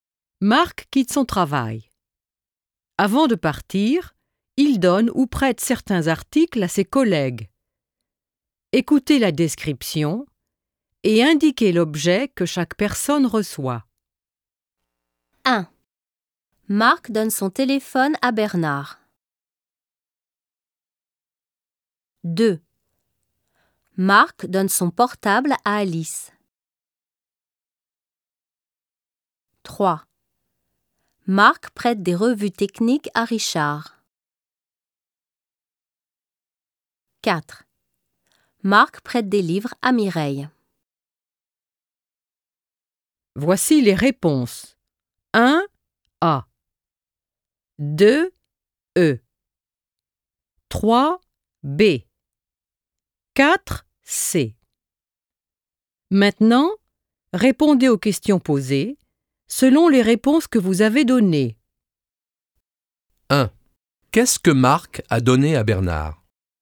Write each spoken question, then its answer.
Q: Qu'est-ce que Marc a donné à Bernard?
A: Il lui a donné son téléphone.